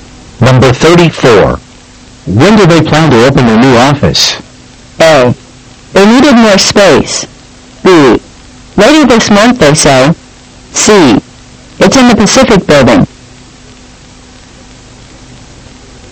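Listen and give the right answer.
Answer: B: Later this month, they say.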